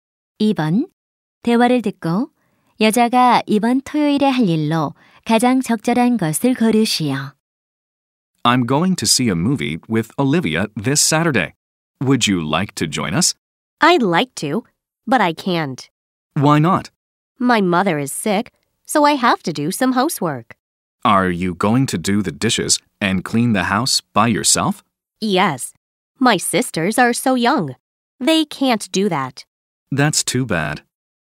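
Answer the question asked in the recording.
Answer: 집안일 하기(설거지와 청소)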